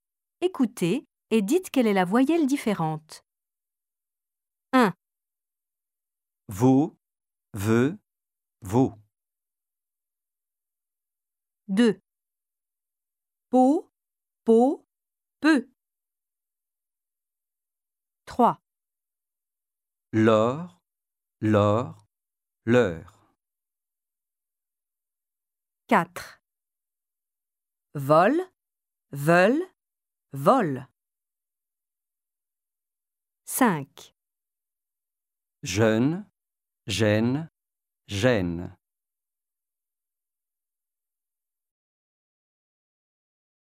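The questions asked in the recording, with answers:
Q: Vaut, veut, vaut.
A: la 2e (veut)

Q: Peau, peau, peut.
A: la 3e (peut)

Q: L'or, l'or, l'heure.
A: la 3e (l'heure)

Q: Vol, veulent, vol.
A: la 2e (veulent)

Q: Jeune, gêne, gêne.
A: la 1re (jeune)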